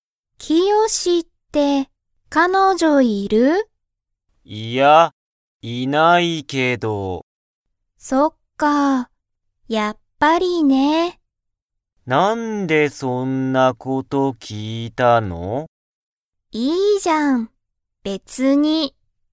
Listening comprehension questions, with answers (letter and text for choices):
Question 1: キヨシは、彼女(かのじょ)がいますか?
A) はい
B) いいえ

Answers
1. B) いいえ

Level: Level 1